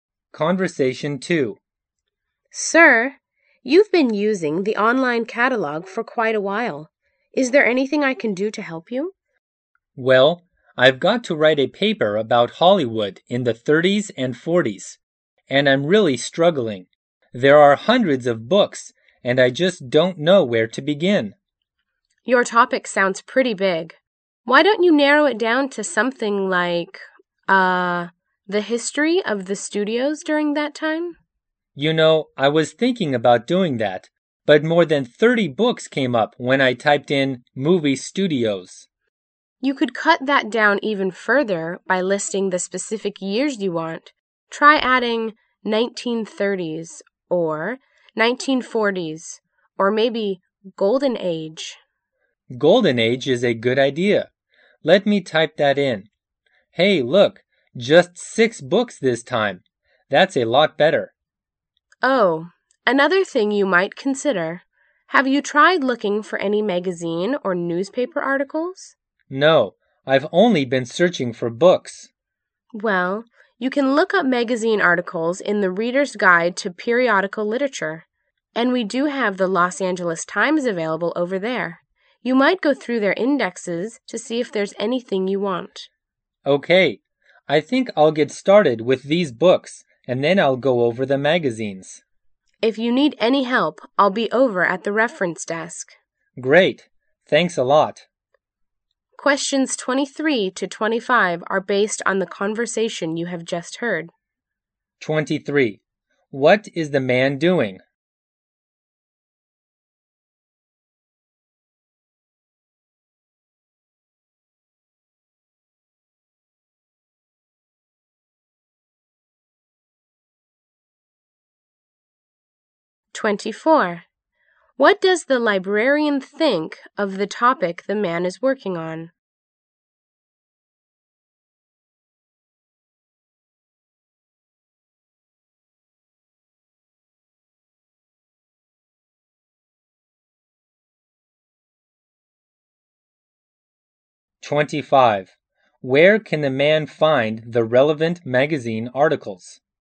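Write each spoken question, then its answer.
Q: What is the man doing?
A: Looking for books for a paper on Hollywood in the 30s and 40s.

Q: What does the librarian think of the topic the man is working on?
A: It is too broad.

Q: Where can the man find the relevant magazine articles?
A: In the Reader's Guide to Periodical Literature.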